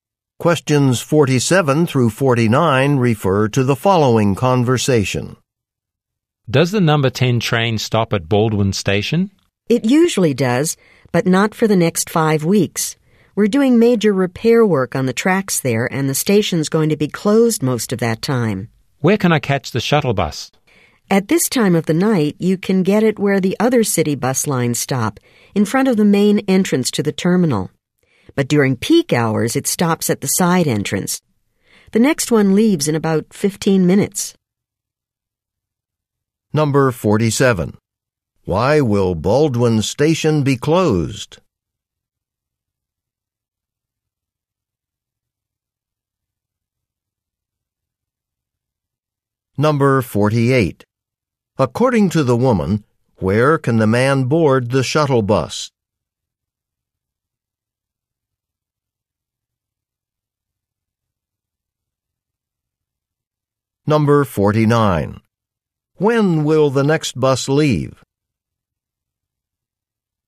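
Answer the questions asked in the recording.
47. For repair work on the tracks
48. In front of the main entrance to the terminal
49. In about 15 minutes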